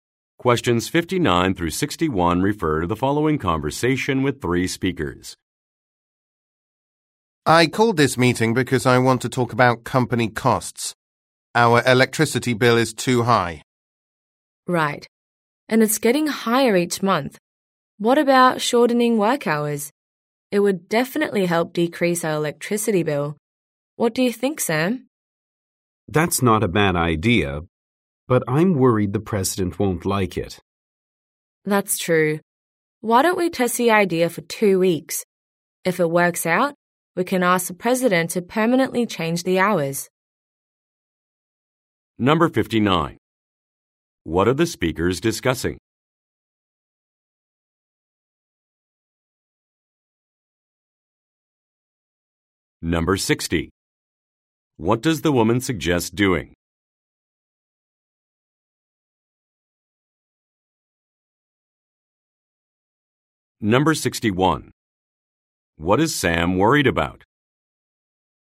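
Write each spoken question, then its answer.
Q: What are the speakers discussing?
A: Company costs / high electricity bill

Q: What is Sam worried about?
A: The president won't like it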